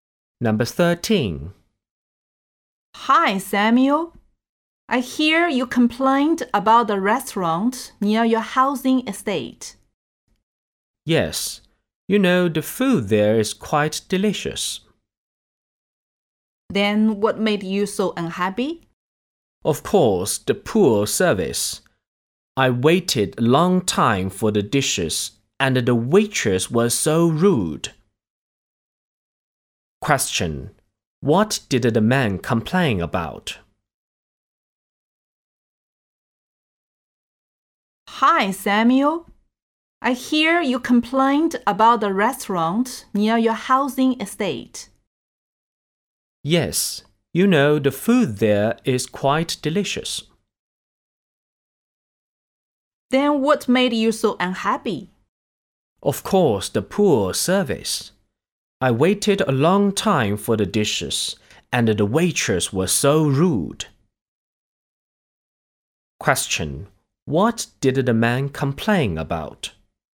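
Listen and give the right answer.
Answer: The poor service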